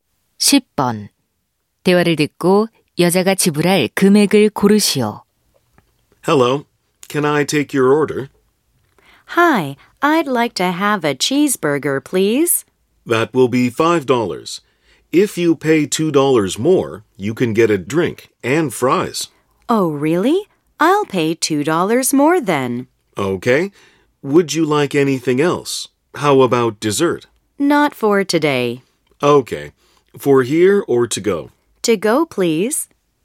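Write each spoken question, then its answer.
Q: 대화를 듣고 여자가 지불할 금액을 고르시오.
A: 7달러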